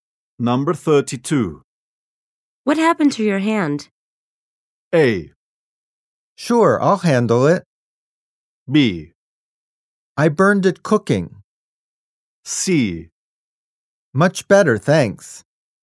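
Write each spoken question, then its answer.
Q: What happened to your hand?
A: B: I burned it cooking.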